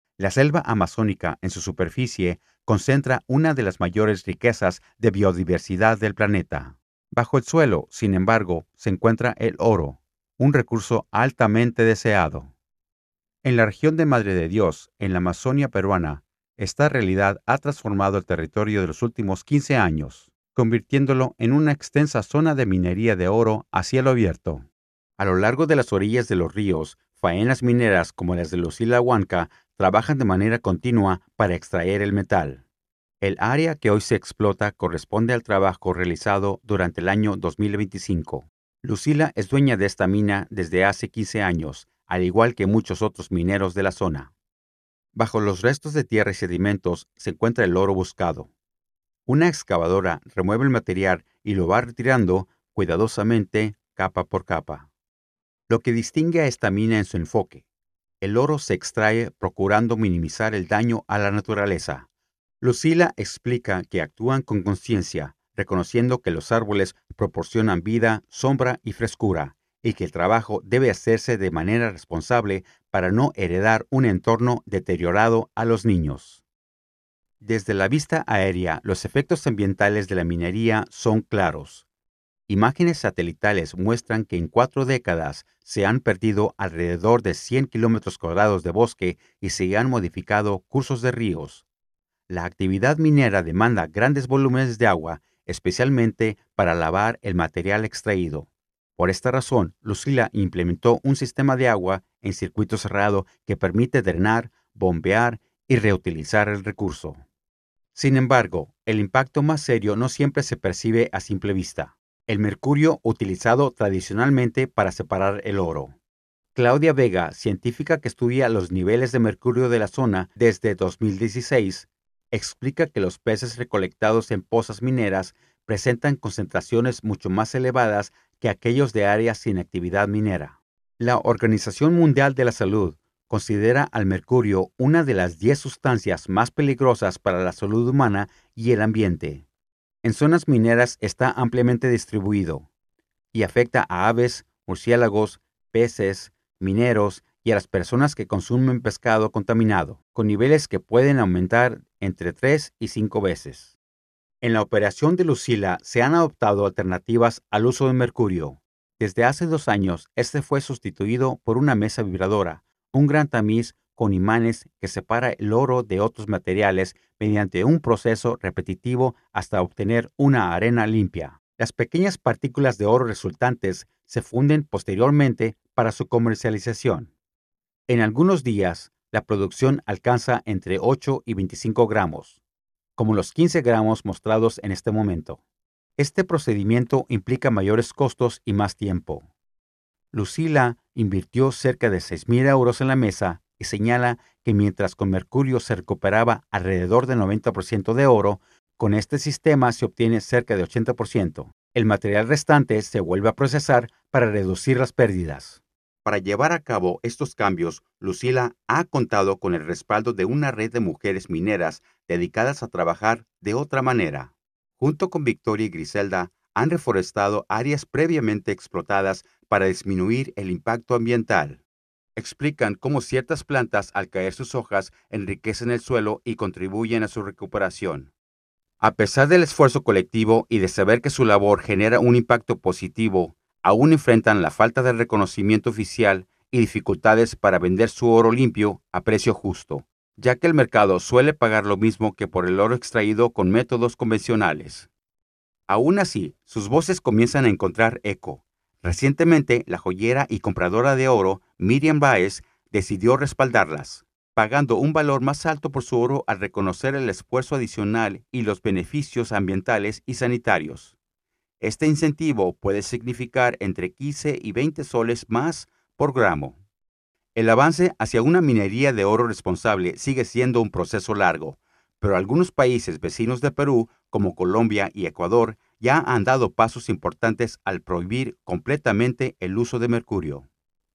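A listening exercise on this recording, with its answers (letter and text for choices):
Escucha el audio para poder contestar las preguntas 10–20.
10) ¿Qué recurso natural es el foco principal de la actividad descrita en Madre de Dios?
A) Petróleo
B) Madera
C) Oro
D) Café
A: C) Oro

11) Según el audio, ¿qué práctica instaló Lucila para reducir el consumo y la contaminación por agua?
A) Plantación de árboles en las orillas del río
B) Uso de mercurio reciclado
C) Un circuito cerrado de agua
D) Desvío permanente del río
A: C) Un circuito cerrado de agua

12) ¿Cuál es el principal problema "invisible" que menciona la científica Claudia Vega?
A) La erosión del suelo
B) El mercurio utilizado para unir el oro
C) La reducción de peces por sobrepesca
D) Las emisiones de dióxido de carbono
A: B) El mercurio utilizado para unir el oro

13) ¿Qué evidencia presenta la científica para mostrar el efecto del mercurio?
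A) Encuestas a mineros sobre su salud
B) Imágenes satelitales de deforestación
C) Datos de precios del oro en el mercado local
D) Comparación de concentraciones de mercurio en peces entre áreas con y sin minería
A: D) Comparación de concentraciones de mercurio en peces entre áreas con y sin minería

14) ¿Por qué Lucila y otras mujeres mineras consideran más costoso el método sin mercurio?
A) Porque requieren más trabajadores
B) Porque deben pagar multas ambientales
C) Porque producen menos oro por tonelada de tierra extraída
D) Porque la mesa vibradora cuesta dinero y el proceso es más lento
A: D) Porque la mesa vibradora cuesta dinero y el proceso es más lento

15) ¿Qué ventaja comercial menciona Miriam Báez por comprar oro "limpio" de las mineras?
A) Paga un precio mayor por el trabajo responsable.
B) Le permite evadir regulaciones internacionales.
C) Reduce el peso del oro al fundirlo.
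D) Elimina la necesidad de certificaciones.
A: A) Paga un precio mayor por el trabajo responsable.

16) ¿Qué práctica realizan Lucila, Victoria y Griselda para reducir el impacto de la minería?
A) Introducir especies invasoras que absorben mercurio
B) Reforestar zonas ya explotadas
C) Construir represas permanentes en los ríos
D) Cambiar a minería subterránea intensiva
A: B) Reforestar zonas ya explotadas

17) ¿Cuál de las siguientes afirmaciones resume mejor la posición de las mineras respecto al reconocimiento estatal?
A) Consideran que sus buenas prácticas aún no son reconocidas por el Estado.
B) Están satisfechas con el apoyo gubernamental.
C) Prefieren no tener inspecciones estatales.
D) Reclaman que el Estado impone precios más altos.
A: A) Consideran que sus buenas prácticas aún no son reconocidas por el Estado.

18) ¿Qué efecto en la salud pública se sugiere que puede ocurrir por la presencia de mercurio en el agua?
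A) Disminución de enfermedades transmitidas por mosquitos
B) Exposición humana por consumo de peces contaminados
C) Aumento de la producción de pescado local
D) Mejora de la calidad del agua para riego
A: B) Exposición humana por consumo de peces contaminados

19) ¿Qué medidas han tomado países vecinos según el texto?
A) Han promovido la minería artesanal sin regulación.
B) Han ofrecido subsidios para la compra de mesas vibratorias.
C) Han aumentado el uso del mercurio en la minería.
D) Han prohibido el mercurio por completo.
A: D) Han prohibido el mercurio por completo.

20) ¿Cuál es una dificultad económica que enfrentan las mineras responsables al vender su oro?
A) No encuentran mercado que pague un precio justo por el oro limpio.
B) No logran reclamar la propiedad de la tierra.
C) El oro limpio no puede ser vendido legalmente.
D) Los compradores exigen el uso de mercurio para certificar la pureza.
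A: A) No encuentran mercado que pague un precio justo por el oro limpio.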